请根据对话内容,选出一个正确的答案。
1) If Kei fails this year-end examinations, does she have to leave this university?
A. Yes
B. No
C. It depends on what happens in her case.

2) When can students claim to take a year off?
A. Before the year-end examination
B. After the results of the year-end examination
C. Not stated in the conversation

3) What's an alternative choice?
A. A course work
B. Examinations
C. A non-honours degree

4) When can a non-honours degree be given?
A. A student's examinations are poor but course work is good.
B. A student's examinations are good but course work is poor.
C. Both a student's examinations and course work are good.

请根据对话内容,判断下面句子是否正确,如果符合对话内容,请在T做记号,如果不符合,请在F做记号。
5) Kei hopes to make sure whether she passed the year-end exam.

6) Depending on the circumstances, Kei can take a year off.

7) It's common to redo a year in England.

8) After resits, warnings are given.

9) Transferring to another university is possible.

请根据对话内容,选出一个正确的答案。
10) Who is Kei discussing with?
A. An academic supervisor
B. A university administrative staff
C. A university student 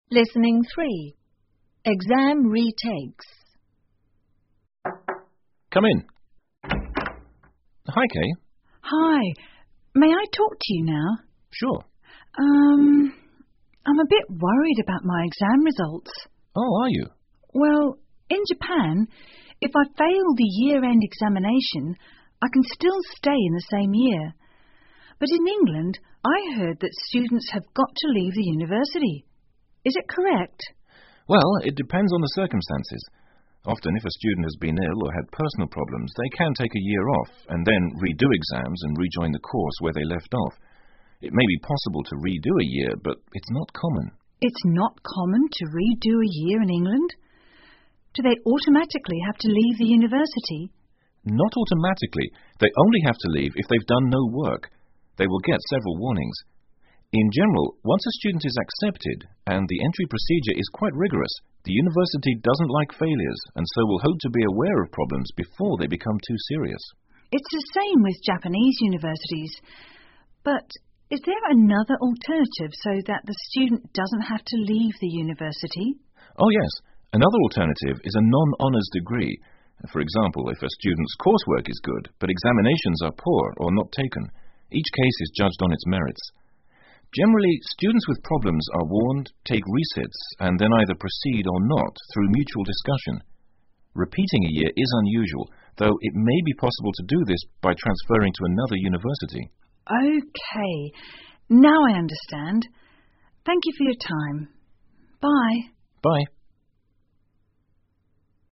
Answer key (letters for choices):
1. C
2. C
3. C
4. A
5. F
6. T
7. F
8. F
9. T
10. A

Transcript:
Supervisor:Come in.Hi,Kei.
Kei:Hi,may I talk to you now?
S:Sure.
K:Urm,I'm a bit worried about my exam results.
S:Oh,are you?
K:Well,in Japan,if I fail the year-end examination,I can still stay in the same year.But in England,I heard that students have got to leave the university.Is it correct?
S:Well,it depends on the circumstances.Often,if a students has been ill or had personal problems,they can take a year off-and then,redo exams and rejoin the course where they left off.I may be possible to redo a year,but it's not common.
K:It's not common to redo a year in England?Do they automatically have to leave the university?
S:Not automatically.They only have to leave if they've done no work.They will get several warnings.In general,once a student is accepted-and the entry procedure is quite rigorous-the university doesn't like failures and so will hope to aware of problems before they become too serious.
K:It's the same with Japanese universities.But is there another alternative so that the student doesn't have to leave the university?
S:Oh,yes.Another alternative is a non-honours degree.For example,if a student's course work is good,but examinations are poor or not taken.Each case is judged on its merits.Generally,students with problems are warned,take resits and then either proceed or not-through mutual discussion.Repeating a year is unusual-though it may be possible to do this by transferring to another university.
K:OK,now I understand.Thank you for your time.Bye.
S:Bye.